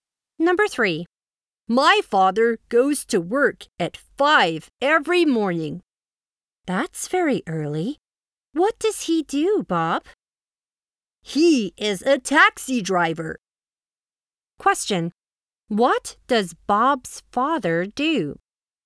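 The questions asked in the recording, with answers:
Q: What does Bob's father do?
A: He is a taxi driver.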